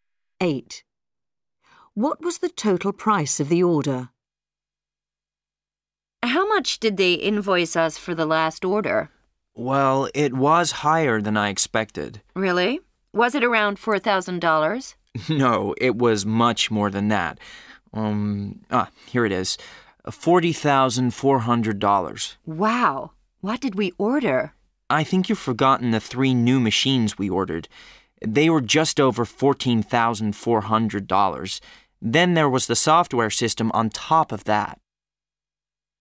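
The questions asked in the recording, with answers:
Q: What was the total price of the order?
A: $40,400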